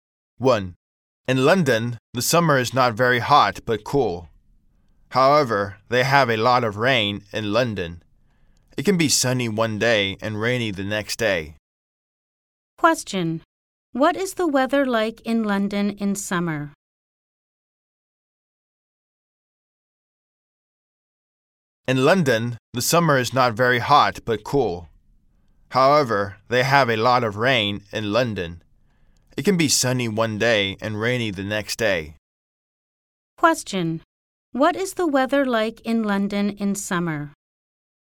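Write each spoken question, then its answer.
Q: What is the weather like in London in summer?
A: Cool, not very hot, with a lot of rain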